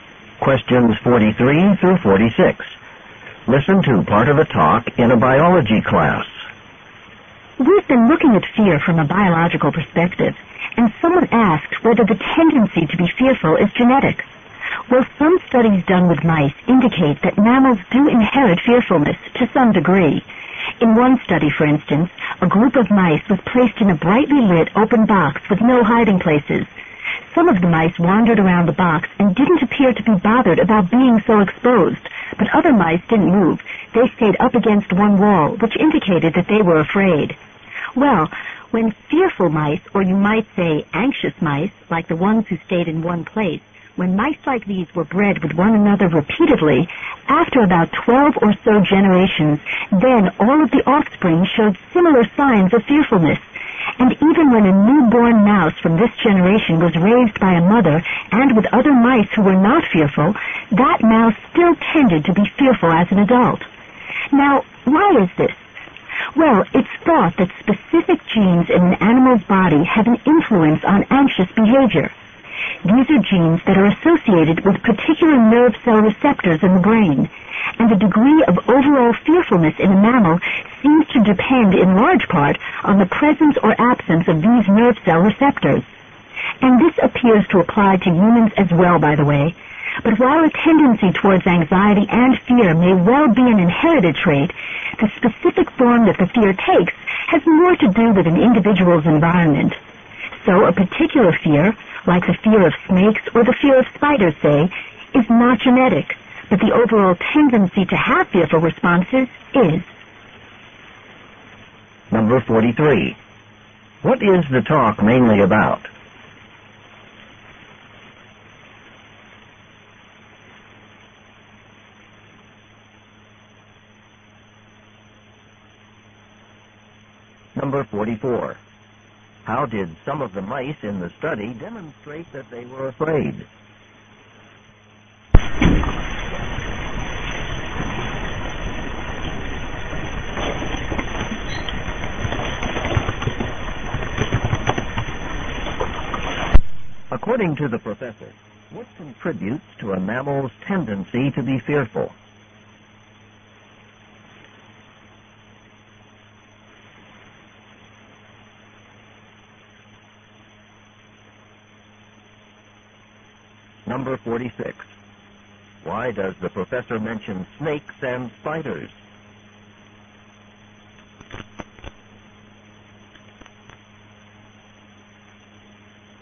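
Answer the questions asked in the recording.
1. Whether the tendency to be fearful is inherited
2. They didn't move and stayed up against one wall
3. Genes linked to nerve cell receptors in the brain
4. To show that specific fears are not genetic but depend on the environment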